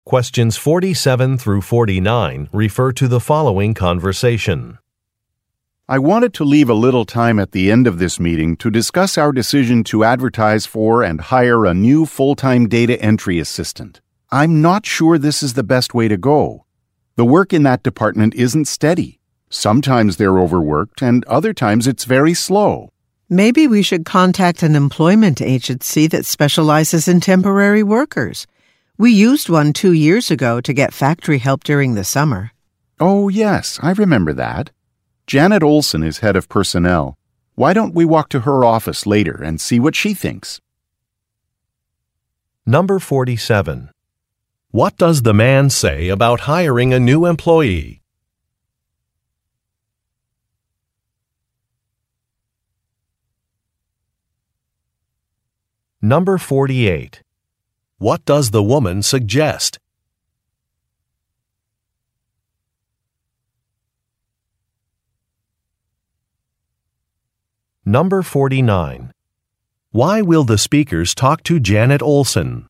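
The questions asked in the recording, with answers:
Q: Why will the speakers talk to Janet Olson?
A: To find out what she thinks, since she is head of personnel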